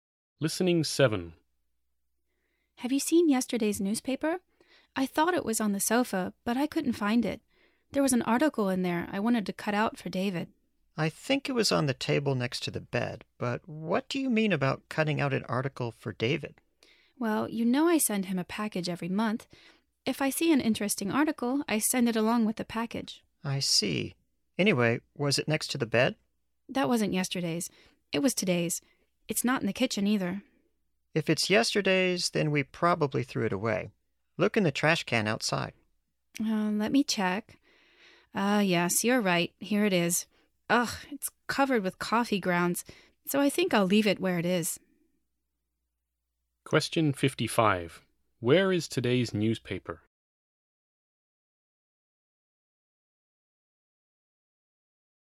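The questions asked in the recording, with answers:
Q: Where is today's newspaper?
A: On the table next to the bed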